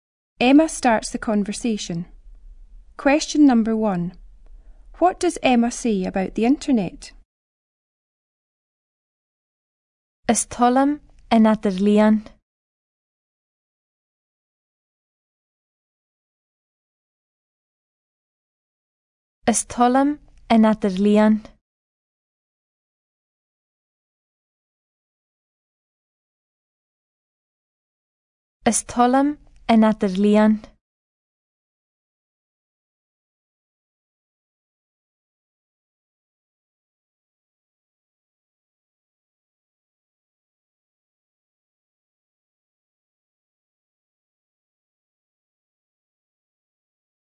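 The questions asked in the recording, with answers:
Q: What does Emma say about the internet?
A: She likes it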